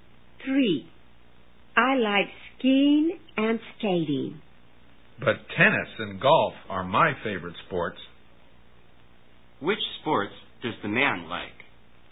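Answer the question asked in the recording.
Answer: Skiing, skating, tennis and golf (tennis and golf are his favorites)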